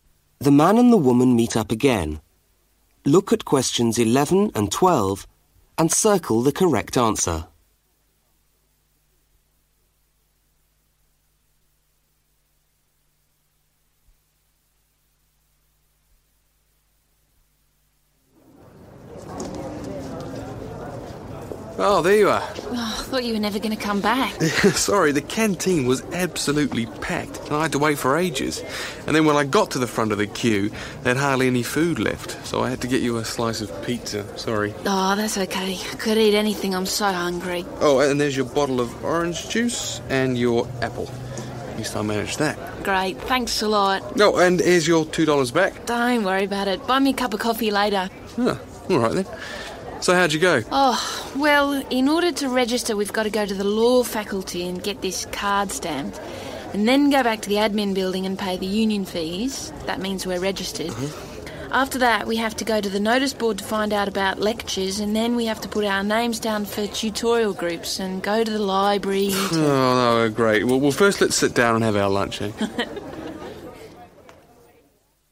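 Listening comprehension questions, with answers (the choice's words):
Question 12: What must the students do as part of registration at the university?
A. Check the notice board in the Law Faculty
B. Find out about lectures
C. Organise tutorial groups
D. Pay the union fees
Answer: Pay the union fees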